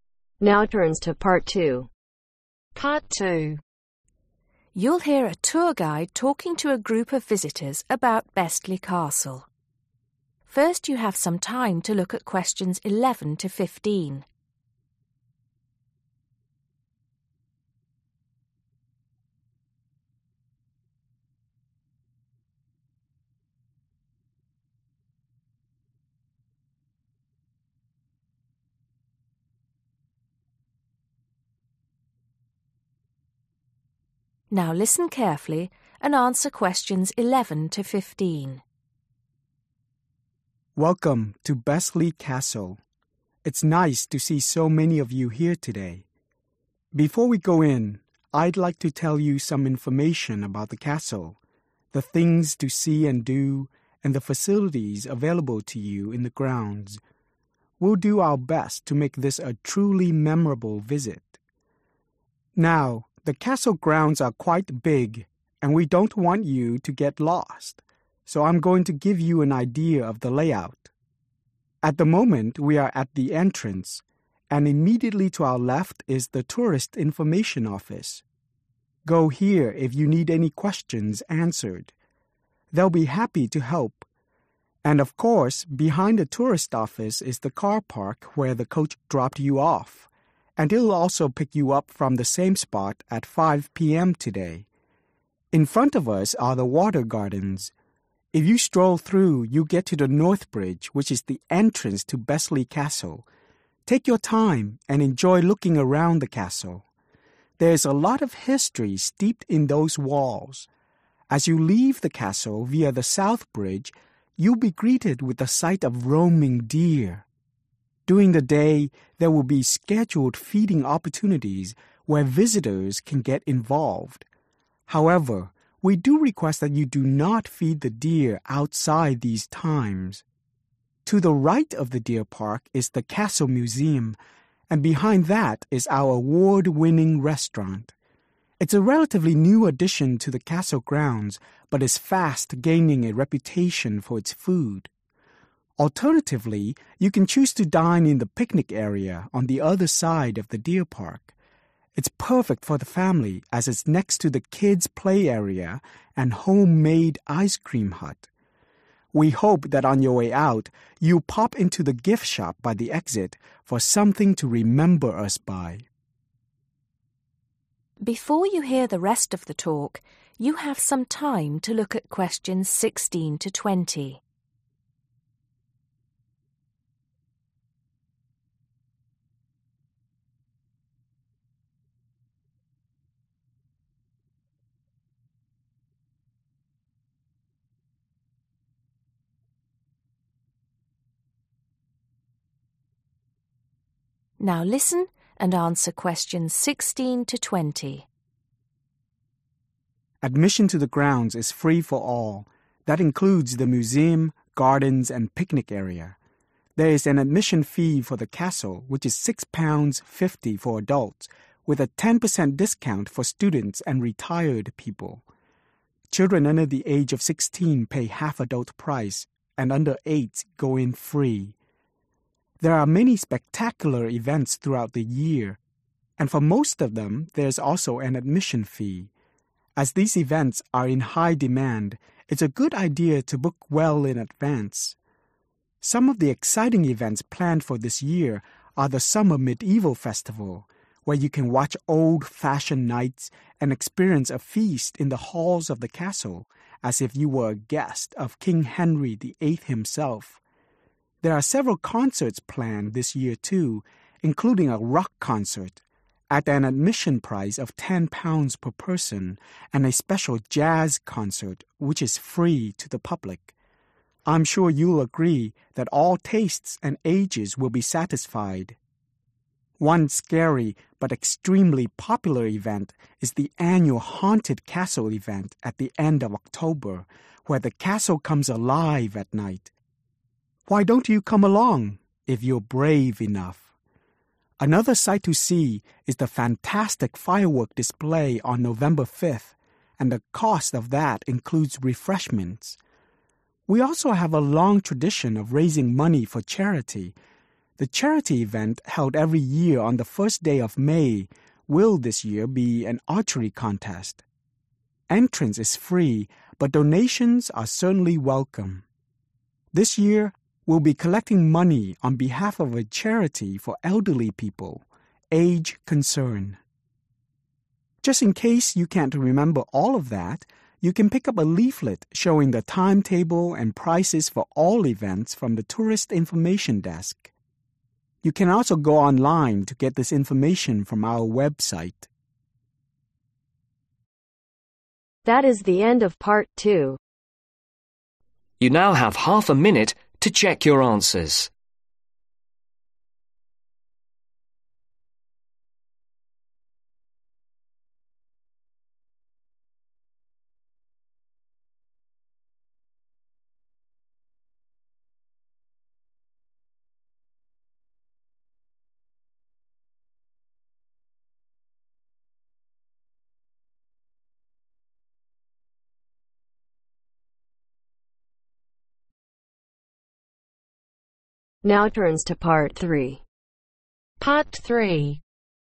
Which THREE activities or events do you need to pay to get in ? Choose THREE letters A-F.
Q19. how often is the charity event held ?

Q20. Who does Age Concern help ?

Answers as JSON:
{"19": "every year", "20": "elderly people"}